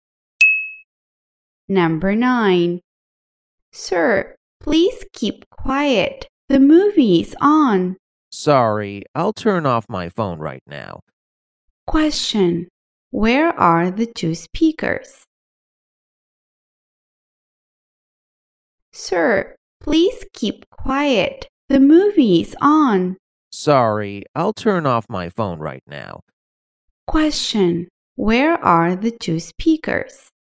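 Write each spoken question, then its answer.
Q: Question. Where are the two speakers?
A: In a cinema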